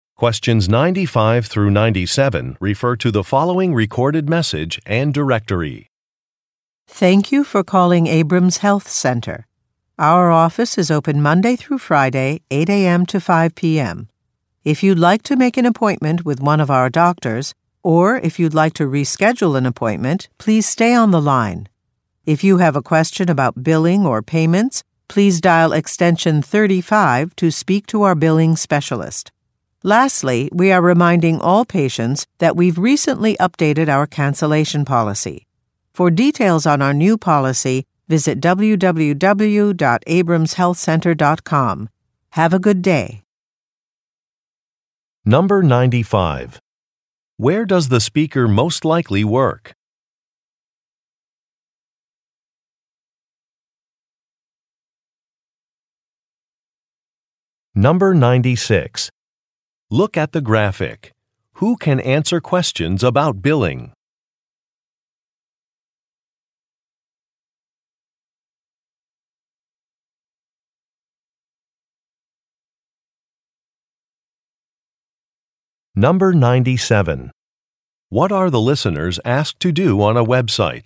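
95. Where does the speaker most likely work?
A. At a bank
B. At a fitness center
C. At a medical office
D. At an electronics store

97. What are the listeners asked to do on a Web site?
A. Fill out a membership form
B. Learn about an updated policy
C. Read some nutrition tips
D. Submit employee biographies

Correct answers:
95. C
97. B

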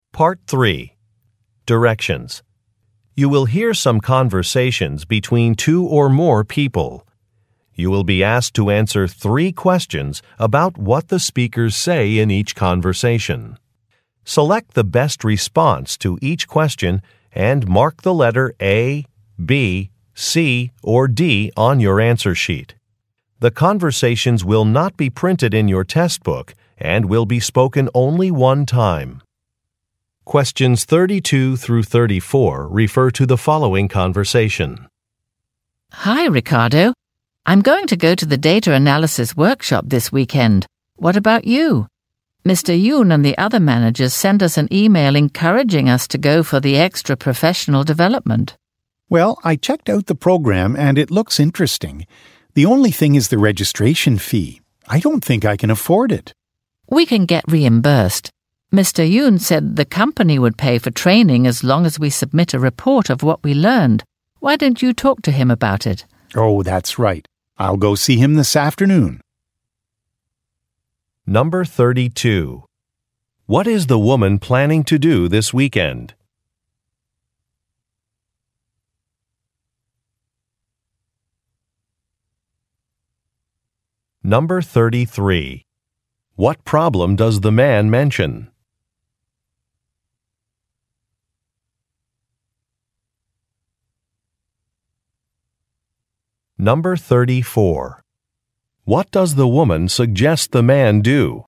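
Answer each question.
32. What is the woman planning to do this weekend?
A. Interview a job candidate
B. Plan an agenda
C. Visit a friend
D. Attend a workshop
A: D

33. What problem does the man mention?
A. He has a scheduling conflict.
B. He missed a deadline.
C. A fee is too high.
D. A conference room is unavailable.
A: C

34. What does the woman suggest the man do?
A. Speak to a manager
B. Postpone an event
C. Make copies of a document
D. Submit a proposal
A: A

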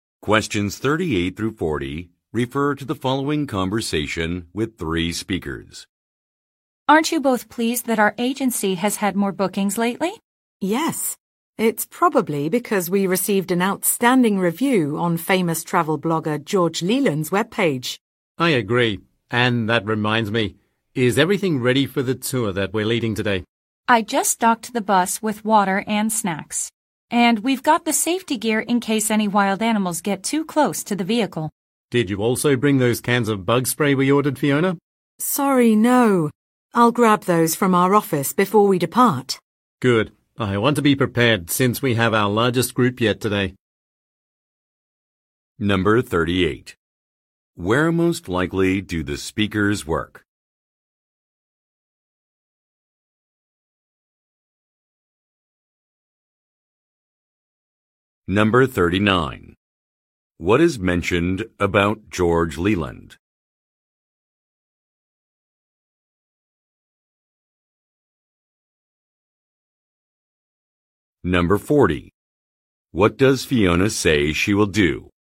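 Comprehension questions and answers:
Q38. Where most likely do the speakers work?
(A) At an accommodation facility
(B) At a tour company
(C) At a beverage company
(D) At a car rental agency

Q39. What is mentioned about George Leeland?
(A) He canceled a trip.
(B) He launched a Web site.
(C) He gave positive feedback.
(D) He recruited new workers.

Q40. What does Fiona say she will do?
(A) Post a safety sign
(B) Purchase some drinks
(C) Get some supplies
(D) Test drive a vehicle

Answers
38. B
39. C
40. C

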